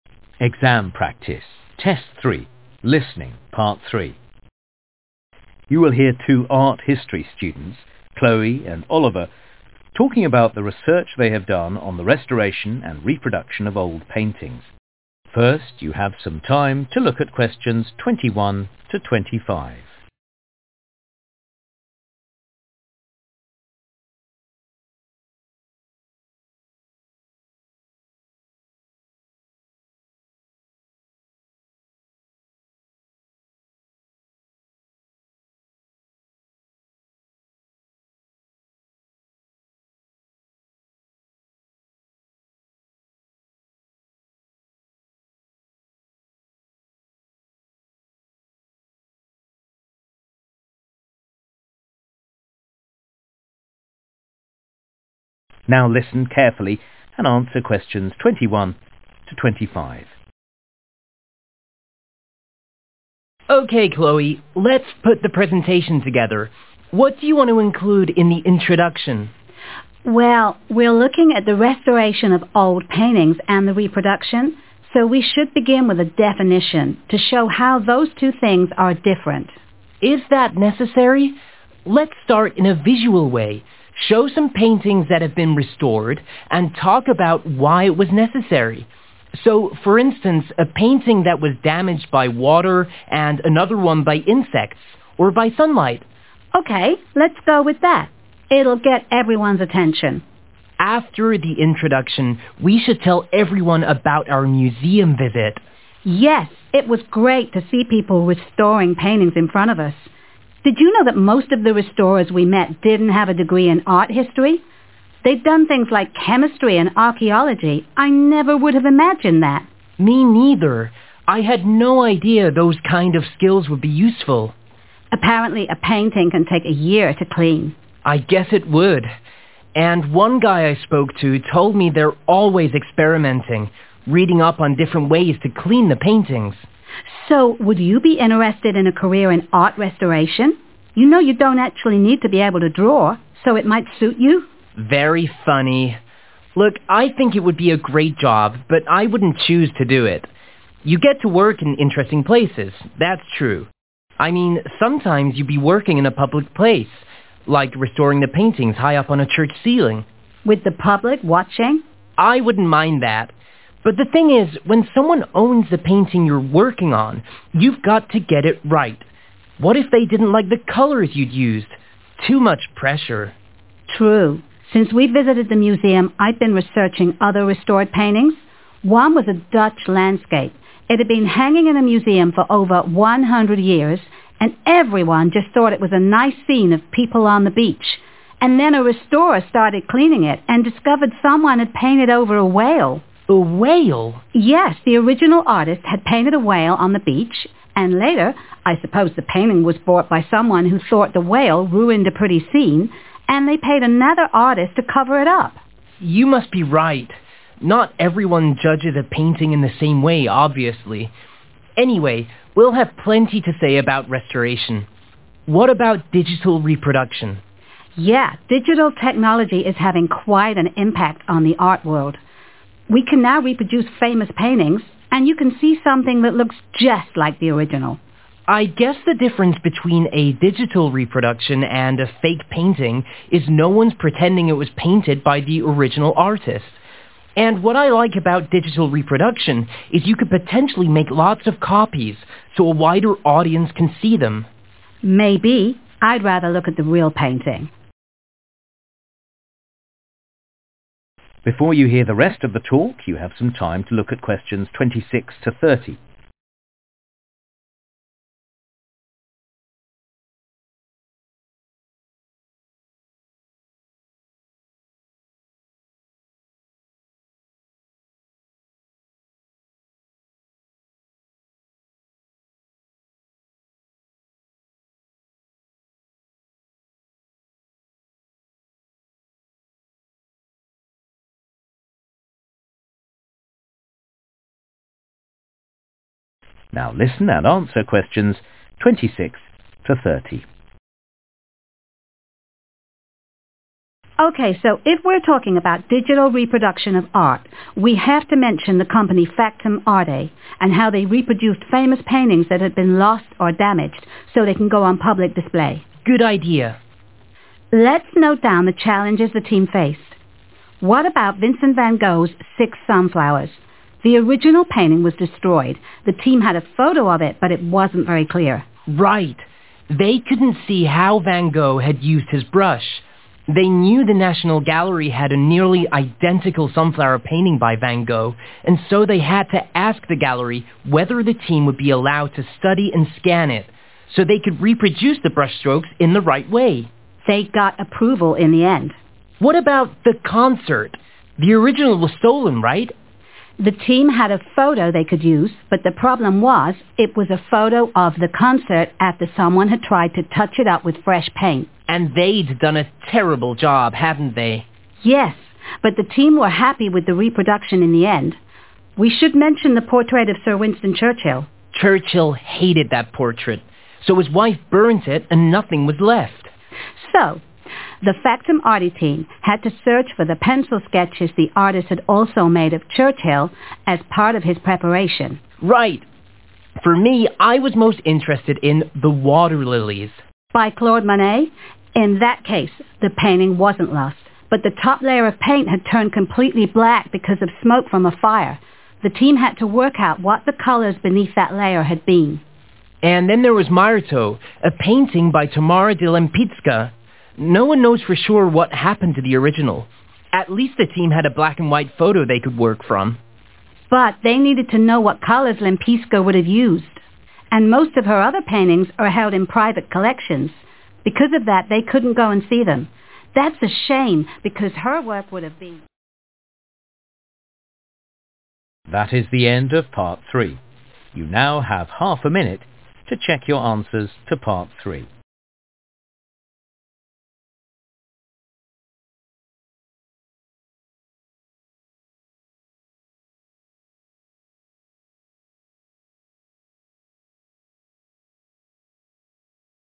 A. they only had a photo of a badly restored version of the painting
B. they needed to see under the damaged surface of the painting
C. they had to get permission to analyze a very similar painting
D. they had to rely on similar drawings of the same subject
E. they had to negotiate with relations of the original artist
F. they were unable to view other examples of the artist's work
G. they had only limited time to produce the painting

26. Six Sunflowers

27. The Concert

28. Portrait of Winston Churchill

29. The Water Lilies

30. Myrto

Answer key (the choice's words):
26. they had to get permission to analyze a very similar painting
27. they only had a photo of a badly restored version of the painting
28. they had to rely on similar drawings of the same subject
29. they needed to see under the damaged surface of the painting
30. they were unable to view other examples of the artist's work